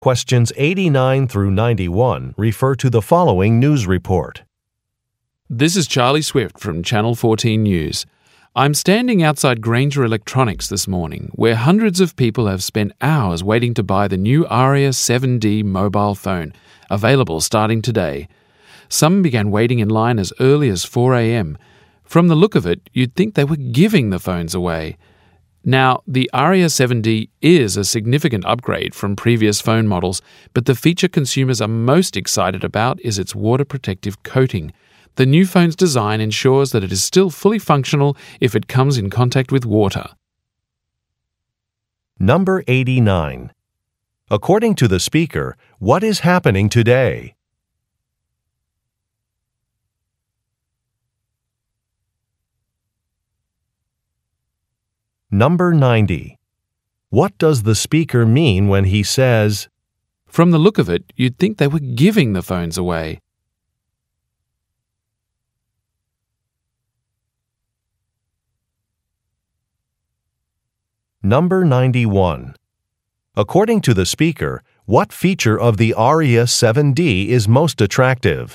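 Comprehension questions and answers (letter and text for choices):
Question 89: According to the speaker, what is happening today?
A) An ad campaign is being launched.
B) A store is opening a new branch.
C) A product is being released in stores.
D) A clearance sale is beginning.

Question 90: What does the speaker mean when he says, "From the look of it, you'd think they were giving the phones away"?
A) The store's advertising is misleading.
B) Some products are no longer in stock.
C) There are a lot of customers waiting at the store.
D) There are many good bargains at the store.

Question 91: According to the speaker, what feature of the Aria 7D is most attractive?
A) Its water resistance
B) Its affordable price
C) Its colorful patterns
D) Its slim design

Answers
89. C) A product is being released in stores.
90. C) There are a lot of customers waiting at the store.
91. A) Its water resistance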